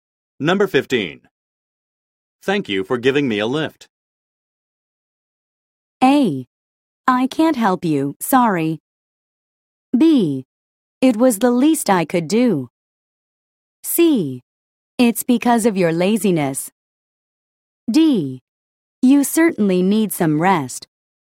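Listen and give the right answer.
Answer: B: It was the least I could do.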